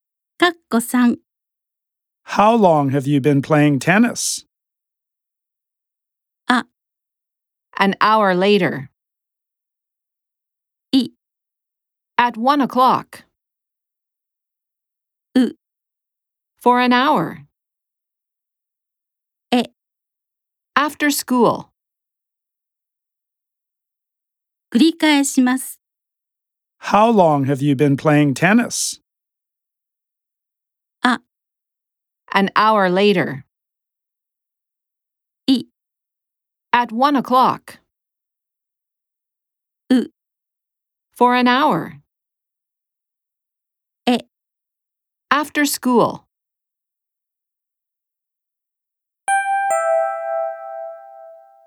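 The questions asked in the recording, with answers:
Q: How long have you been playing tennis?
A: U: For an hour.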